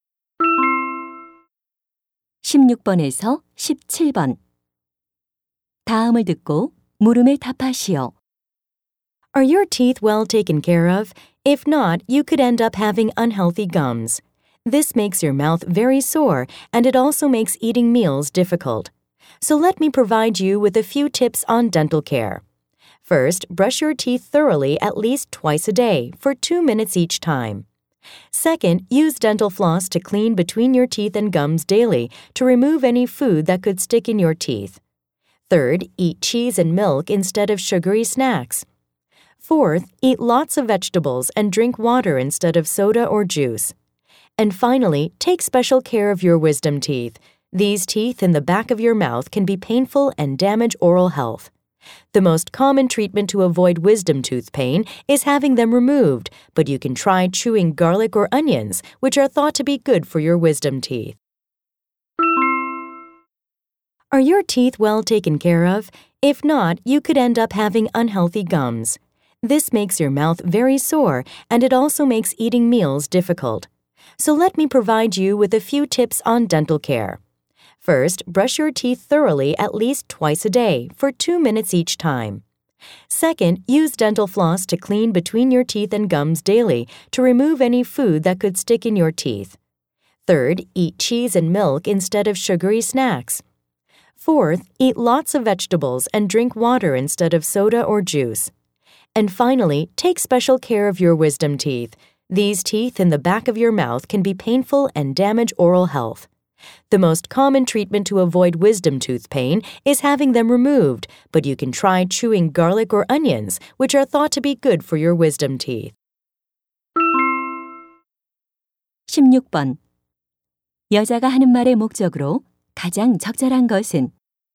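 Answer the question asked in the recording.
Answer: 치아 관리 요령을 알려 주려고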